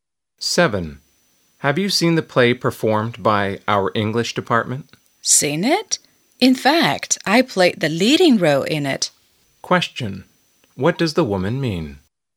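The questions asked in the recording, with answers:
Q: What does the woman mean?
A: She has seen it; she played the leading role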